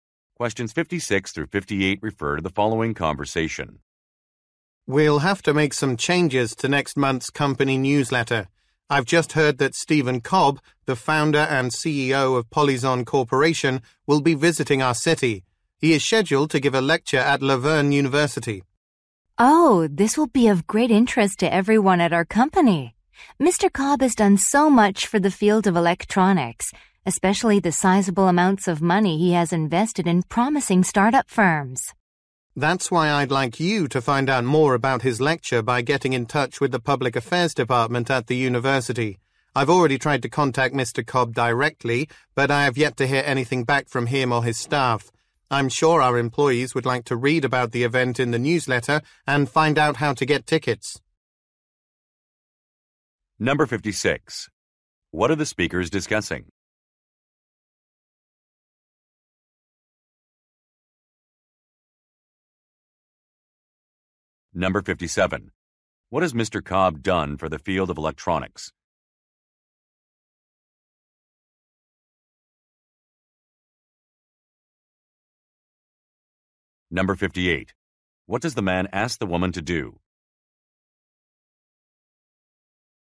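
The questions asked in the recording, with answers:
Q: What are the speakers discussing?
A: Stephen Cobb's upcoming lecture in their city

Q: What has Mr. Cobb done for the field of electronics?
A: Invested in startup firms

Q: What does the man ask the woman to do?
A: Contact the university's Public Affairs Department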